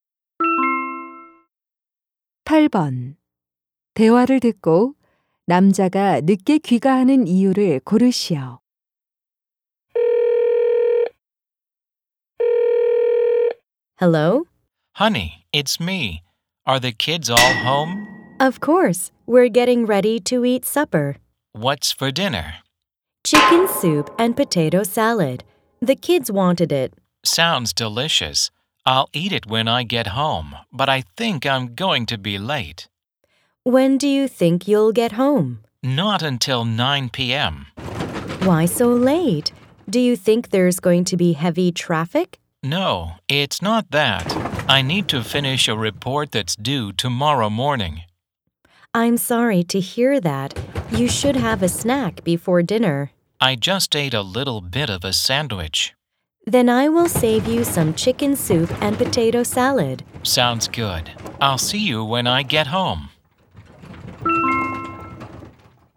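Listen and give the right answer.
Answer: 내일 아침까지 보고서를 끝내야 해서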